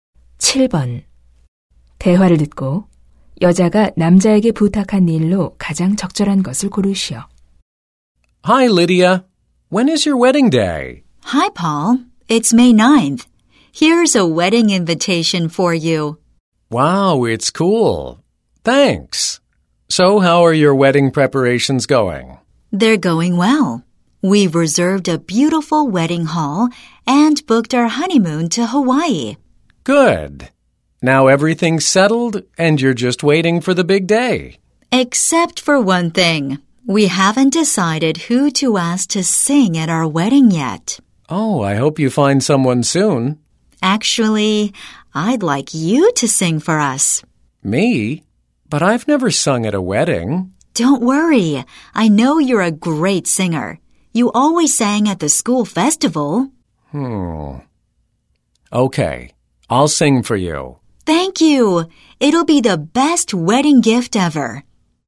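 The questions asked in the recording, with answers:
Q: 대화를 듣고 여자가 남자에게 부탁한 일로 가장 적절한 것을 고르시오.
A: 결혼식에서 축가 부르기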